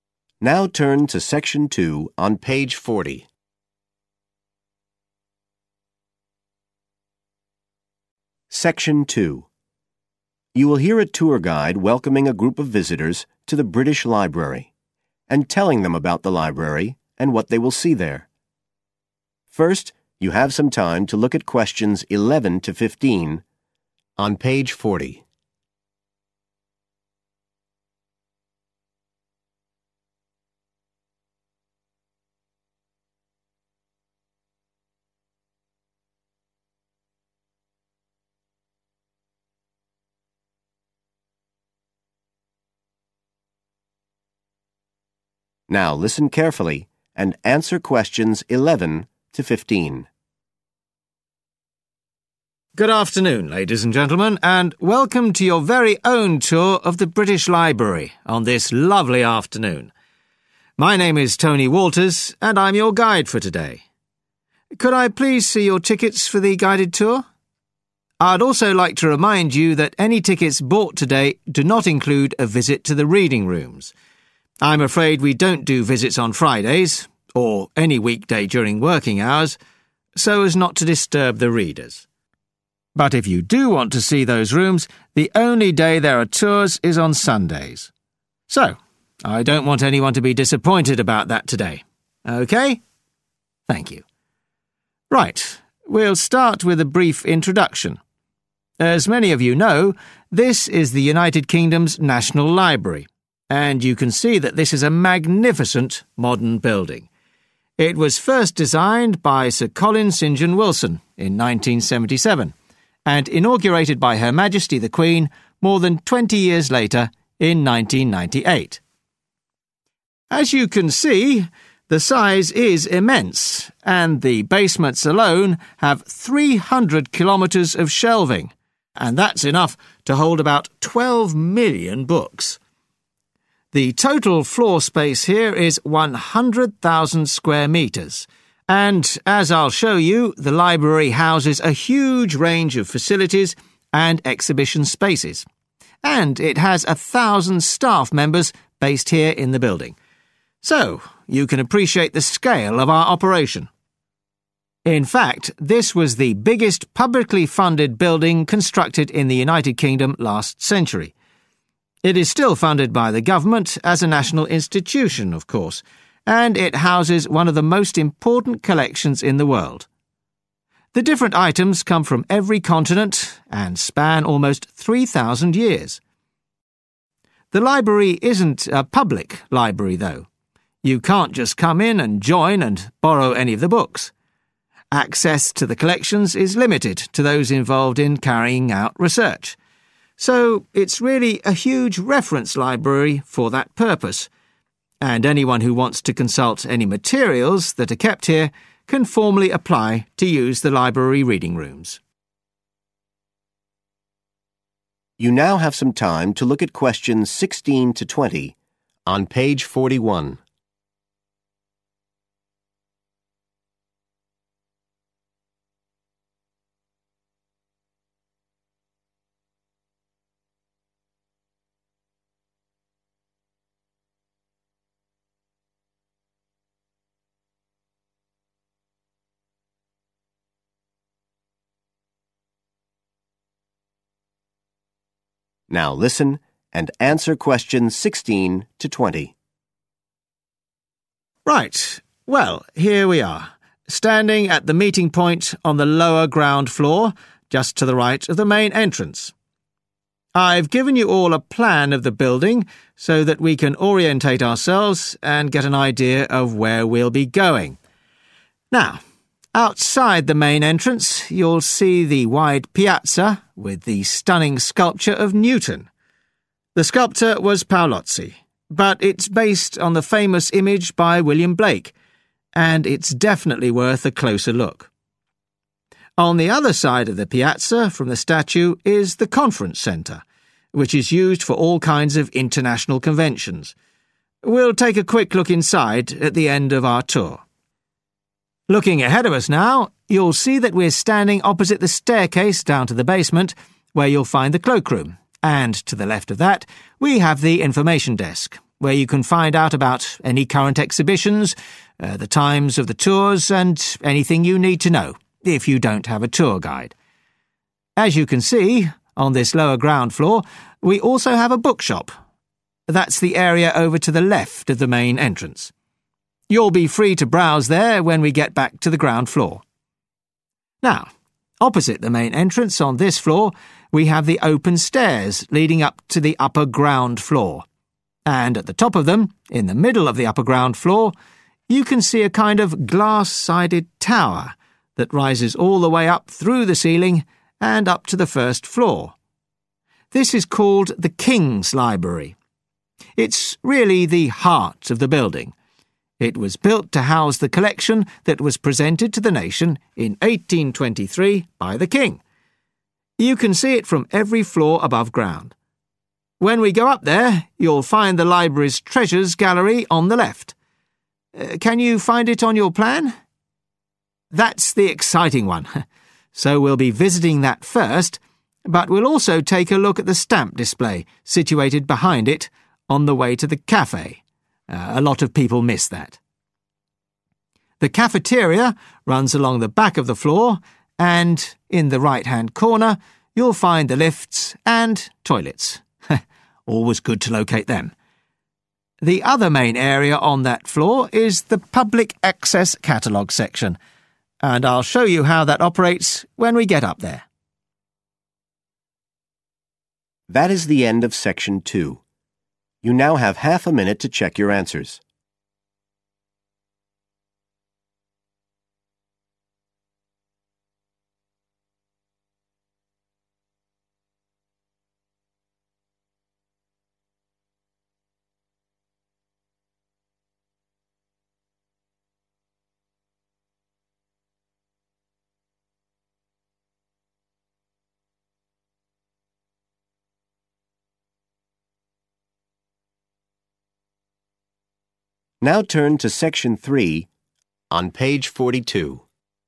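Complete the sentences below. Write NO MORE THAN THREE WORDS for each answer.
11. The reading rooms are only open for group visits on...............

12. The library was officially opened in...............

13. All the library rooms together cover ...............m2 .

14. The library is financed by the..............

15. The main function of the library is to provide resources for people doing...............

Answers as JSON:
{"11": "Sundays", "12": "1998", "13": "100,000", "14": "government", "15": "research"}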